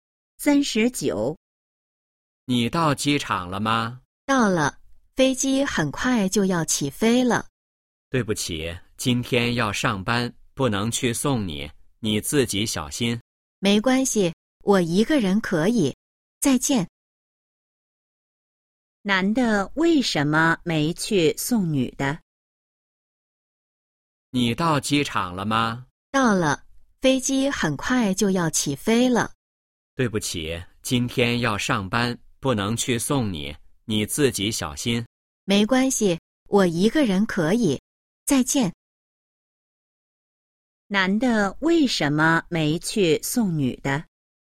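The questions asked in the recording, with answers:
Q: 男的为什么没去送女的?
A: 要上班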